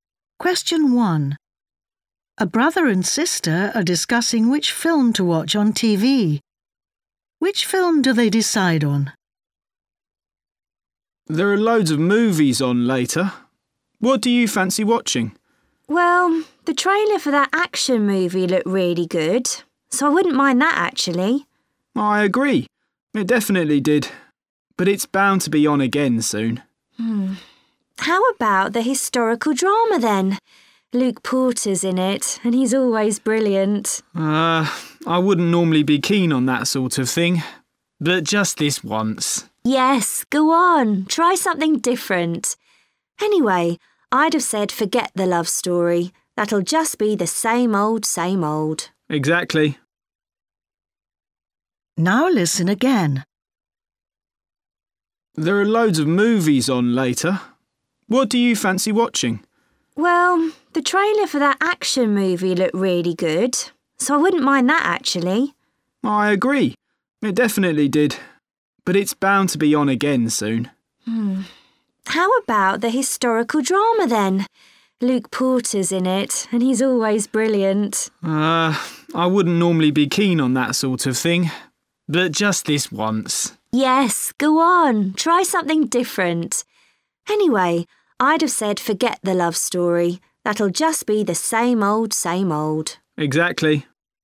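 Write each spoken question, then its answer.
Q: Which film do they decide on?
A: the historical drama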